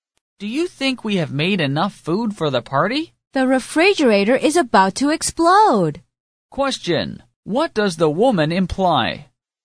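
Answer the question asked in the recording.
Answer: They have made more than enough food.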